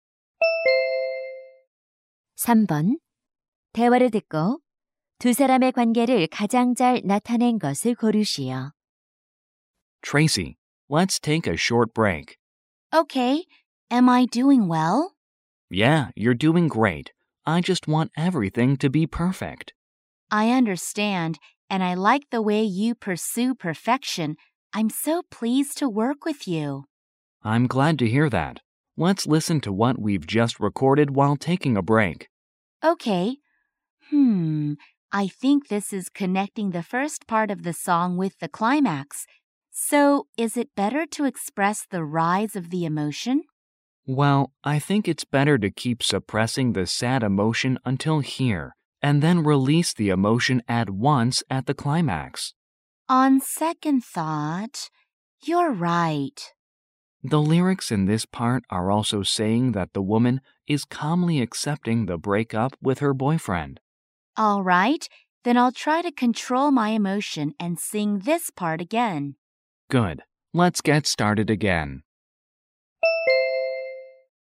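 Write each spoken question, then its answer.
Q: 대화를 듣고 두 사람의 관계를 가장 잘 나타낸 것을 고르시오.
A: 음반 프로듀서 - 가수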